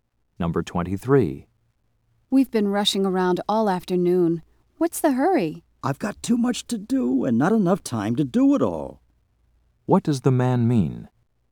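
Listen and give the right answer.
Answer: He has too much to do in too little time.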